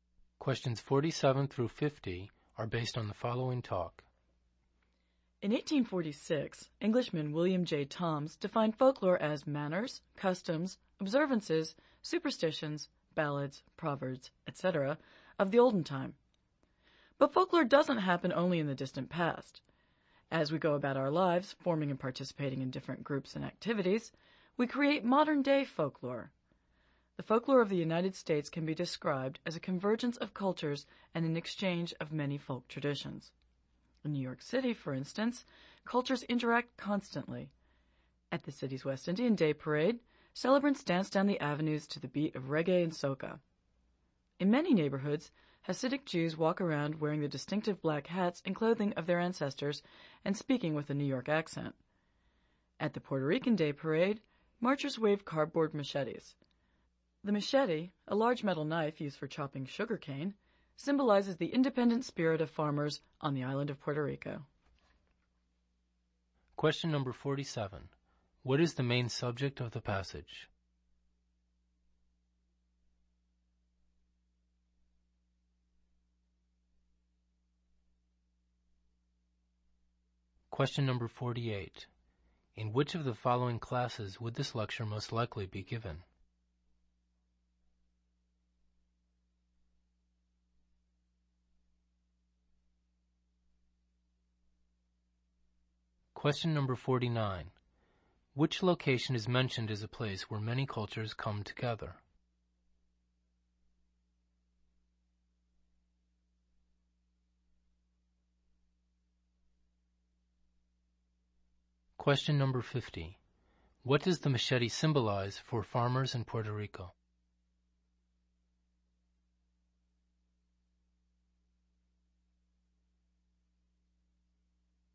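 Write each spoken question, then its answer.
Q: Which location is mentioned as a place where many cultures come together?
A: New York City

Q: What does the machete symbolize for farmers in Puerto Rico?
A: Their independent spirit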